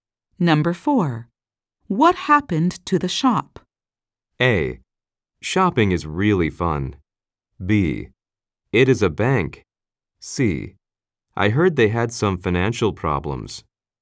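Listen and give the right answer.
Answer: C: I heard they had some financial problems.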